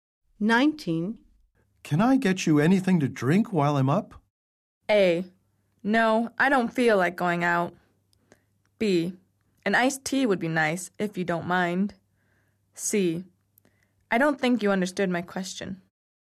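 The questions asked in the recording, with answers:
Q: Can I get you anything to drink while I'm up?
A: B: An iced tea would be nice, if you don't mind.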